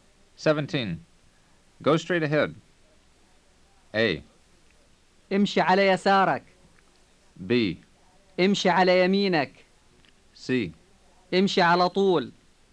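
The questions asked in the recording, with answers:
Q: Go straight ahead.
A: C: امشي على طول.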